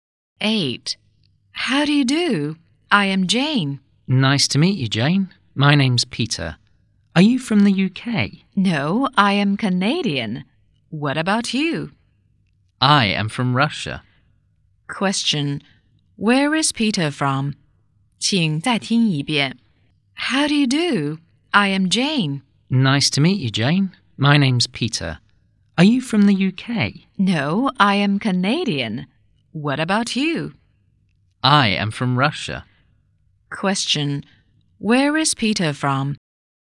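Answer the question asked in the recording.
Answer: Canada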